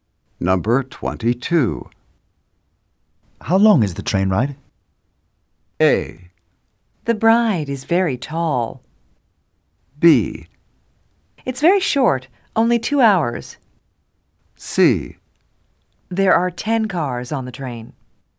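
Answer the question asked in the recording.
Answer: B: It's very short, only 2 hours.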